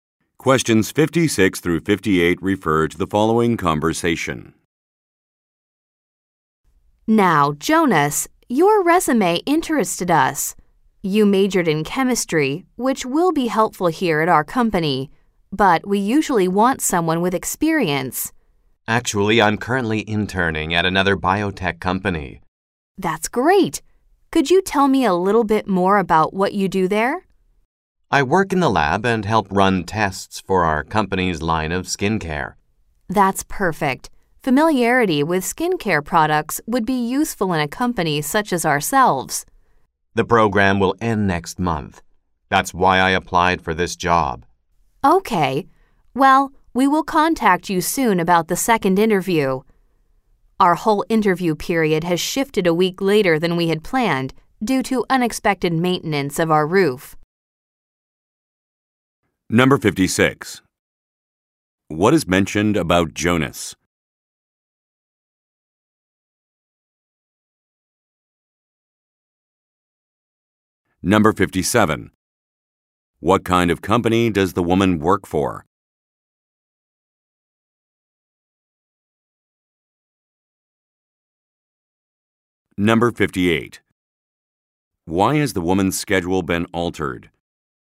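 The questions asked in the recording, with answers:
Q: What kind of company does the woman work for?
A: A biotech company that makes skincare products

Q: Why has the woman's schedule been altered?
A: Because of unexpected maintenance of the roof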